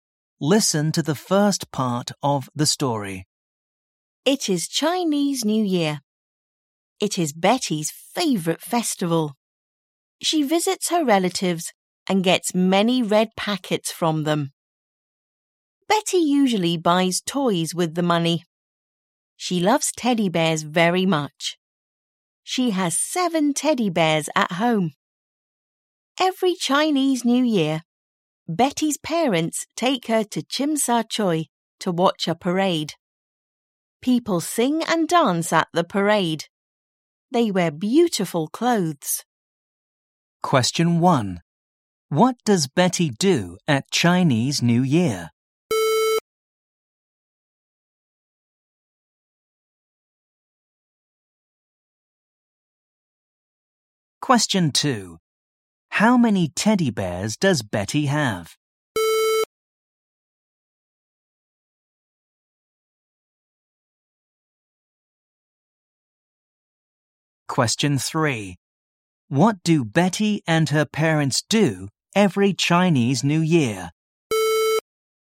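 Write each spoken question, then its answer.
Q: What does Betty do at Chinese New Year?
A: She visits her relatives and gets red packets

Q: What do Betty and her parents do every Chinese New Year?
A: They watch a parade in Chim Sa Choi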